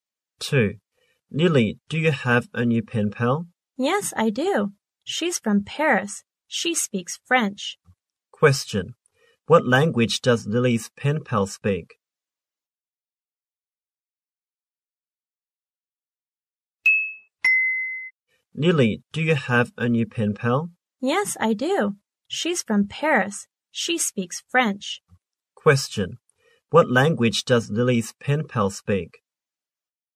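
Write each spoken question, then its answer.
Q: What language does Lily's pen pal speak?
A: French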